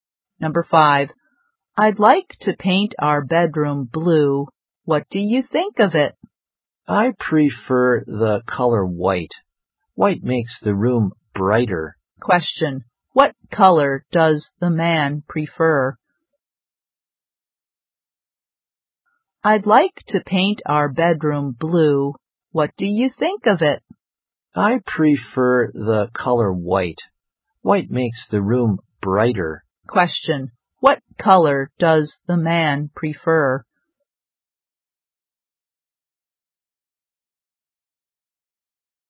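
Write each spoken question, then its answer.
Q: Question,What color does the man prefer?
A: White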